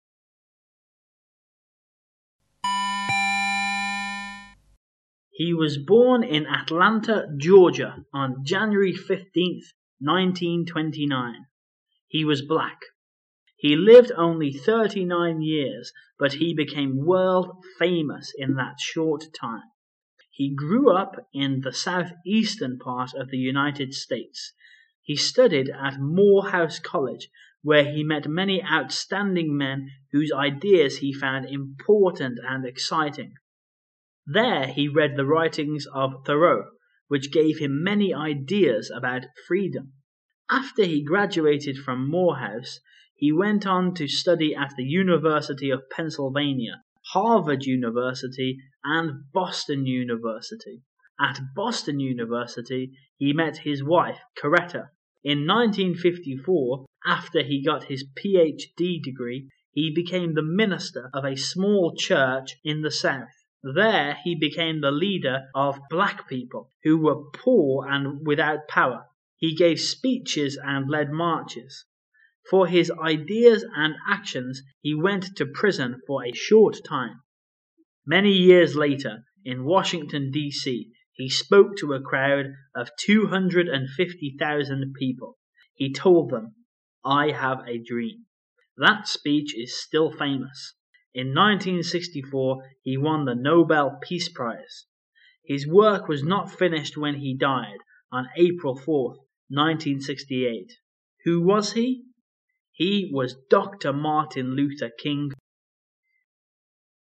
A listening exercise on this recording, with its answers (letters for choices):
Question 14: What gave him many ideas about freedom?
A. The writings of Thoreau.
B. The writings of Washington.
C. The writings of Coretta.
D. The writings of Martin Luther King.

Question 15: When did he win the Nobel Peace Prize?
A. In 1968.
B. In 1918.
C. In 1964.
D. In 1946.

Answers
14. A
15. C

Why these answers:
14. 答案信息对应于独白第六句话:There he read the writings of Thoreau,which gave him many ideas about freedom,即是梭罗的著作对他产生了影响。
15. 独白倒数第四句指出马丁·路德·金是在1964年获得诺贝尔和平奖的。

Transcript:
[解析] 22-25 He was born in Atlanta, Georgia, on January 15,1929. He was black. He lived only thirty-nine years, but he became world-famous in that short time. He grew up in the southeastern part of the United States. He studied at Morehouse College where he met many outstanding men whose ideas he found important and exciting. There he read the writings of Thoreau, which gave him many ideas about freedom. After he graduated from Morehouse, he went on to study at the University of Pennsylvania, Harvard University, and Boston University. At Boston University, he met his wife, Coretta. In 1954, after he got his PhD degree, he became the minister of a small church in the South. There he became the leader of the black people, who were poor and without power. He gave speeches and led marches. For his ideas and actions, he went to prison for a short time. Many years later, in Washington DC, he spoke to a crowd of 250 000 people, He told them, "I have a dream" That speech is still famous. In 1964,he won the Nobel Peace Prize. His work was not finished when he died, on April 4,1968. Who was he? He was Dr Martin Luther King.